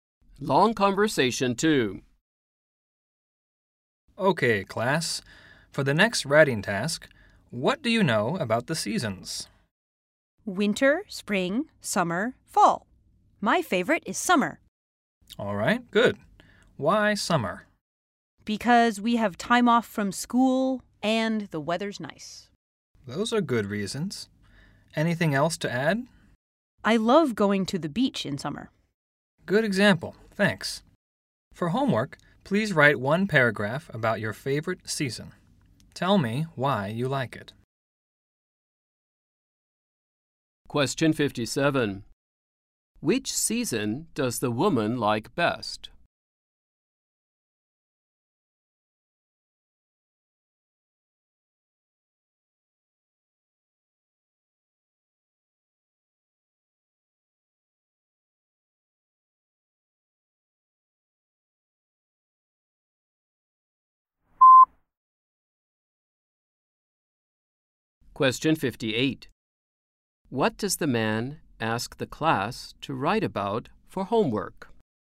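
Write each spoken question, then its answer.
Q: What does the man ask the class to write about for homework?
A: Their favorite season and why they like it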